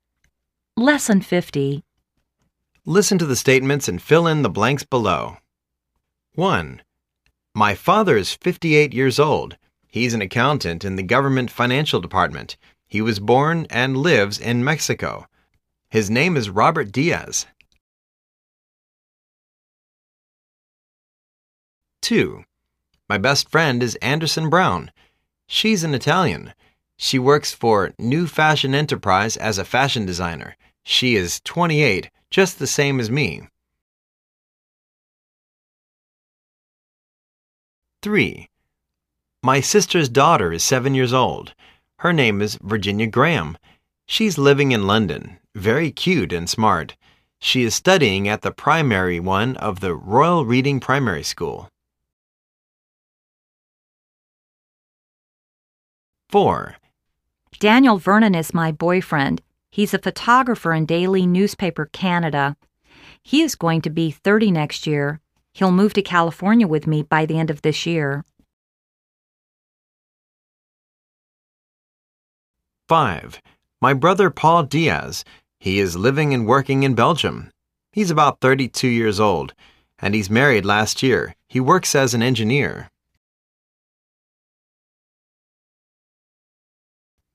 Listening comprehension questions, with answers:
Listen to the statments and fill in the blanks below.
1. Robert Dias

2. Anderson Brown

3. Virginia Graham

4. Daniel Vernon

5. Paul Dias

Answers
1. Mexico
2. ltaly
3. London
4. Canada
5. Belgium

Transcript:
Listen to the statements and fill in the blanks below.
1.My father is 58 years old. He's an accountant in the government financial department. He was born and lives in Mexico. His name is Robert Dias.
2.My best friend is Anderson Brown.She's an Italian.She works for New Fashion Enterprise as a fashion designer.She is 28 just the same as me.
3.My sister's daughter is 7 years old. Her name is Virginia Graham. She's living in London. Very cute and smart.She is studying at the primary one of the Royal Reading Primary School.
4.Daniel Vernon is my boyfriend. He's a photographer in Daily Newspaper, Canada. He is going to be 30 next year. He'II move to California with me by the end of this year.
5.My brother, Paul Dias. He is living and working in Belgium. He's about 32 years old. And, he's married last year.He works as an engineer.